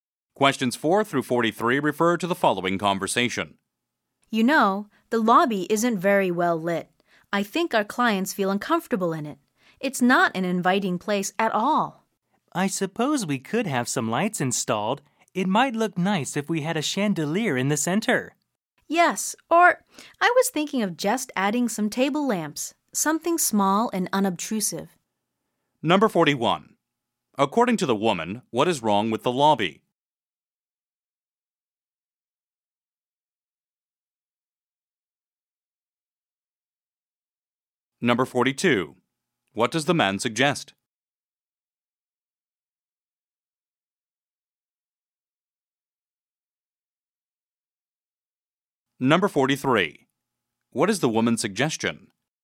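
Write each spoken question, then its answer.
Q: According to the woman, what is wrong with the lobby?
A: It isn't well lit, so it is uninviting

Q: What does the man suggest?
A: Installing lights, such as a chandelier in the center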